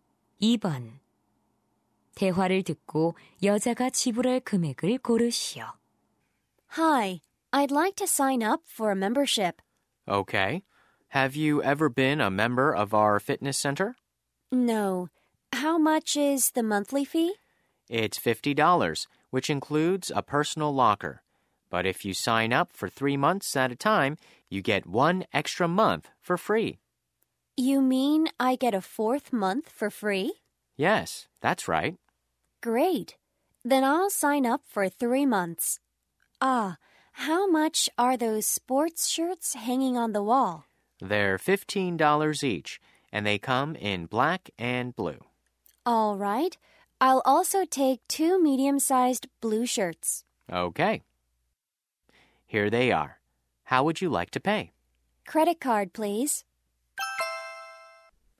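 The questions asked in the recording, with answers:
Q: 대화를 듣고 여자가 지불할 금액을 고르시오.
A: $180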